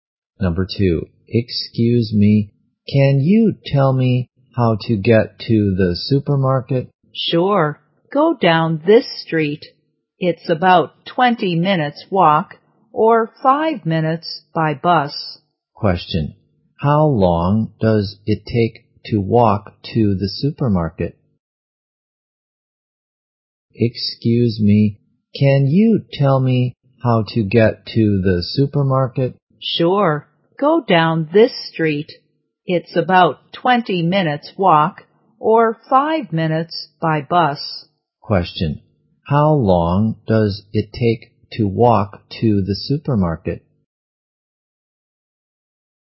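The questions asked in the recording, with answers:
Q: Question. How long does it take to walk to the supermarket?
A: About 20 minutes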